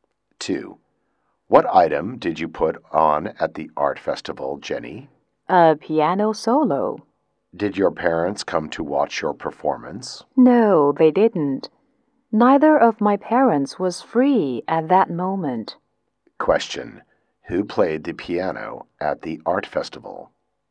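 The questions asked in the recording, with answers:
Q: who played the piano at the art festival?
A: Jenny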